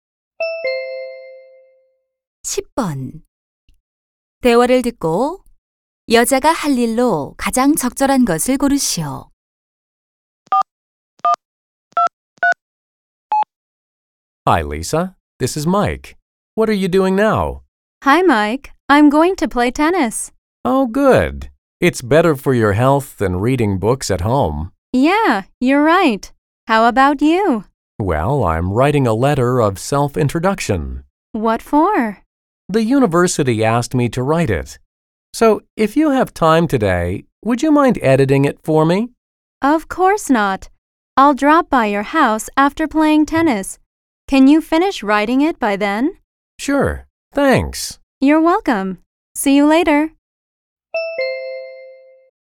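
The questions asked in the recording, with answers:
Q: 대화를 듣고 여자가 할 일로 가장 적절한 것을 고르시오.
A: 테니스를 친 후 Mike의 자기소개서 교정해 주기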